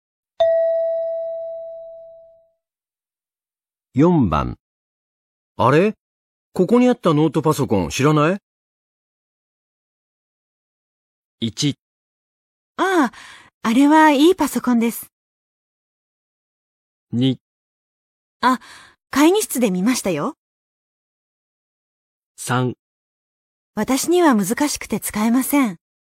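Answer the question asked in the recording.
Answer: 2: あ、会議室で見ましたよ。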